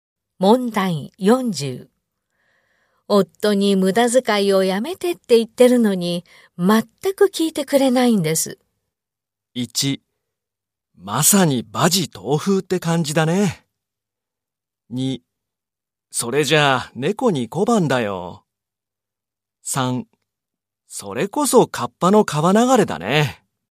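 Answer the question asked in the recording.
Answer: 1: まさに馬耳東風って感じだね。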